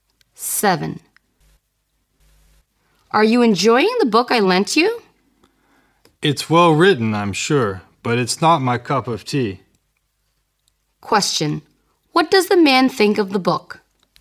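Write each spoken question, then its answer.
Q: What does the man think of the book?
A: It's well written but he doesn't like it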